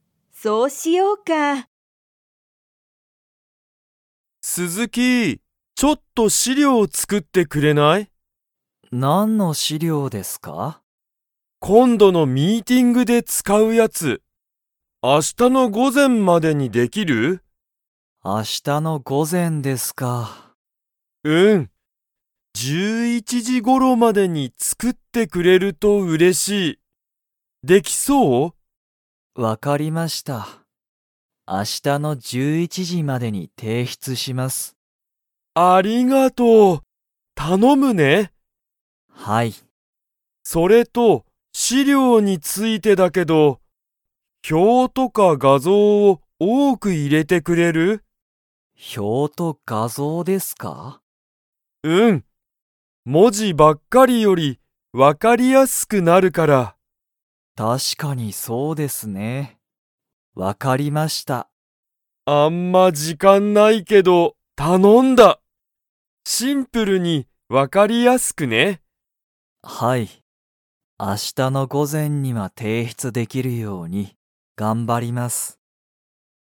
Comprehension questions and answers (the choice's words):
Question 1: 斉藤さいとうさんは、 までに資料しりょうを作つくって欲ほしい。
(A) 今日きょうの午前ごぜん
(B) 今日きょうの午後ごご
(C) 明日あしたの午前ごぜん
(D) 明日あしたの午後ごご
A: 明日あしたの午前ごぜん

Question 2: 鈴木すずきさんは、資料しりょうを文字もじばっかりで作つくりますか?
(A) はい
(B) いいえ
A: いいえ

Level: Level 4